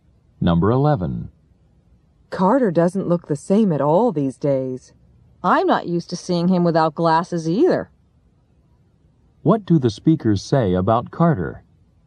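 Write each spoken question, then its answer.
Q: What do the speakers say about Carter?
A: He no longer wears glasses.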